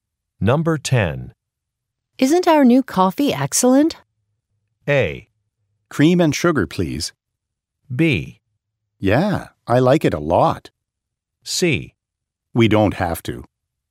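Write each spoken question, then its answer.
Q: Isn't our new coffee excellent?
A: B: Yeah, I like it a lot.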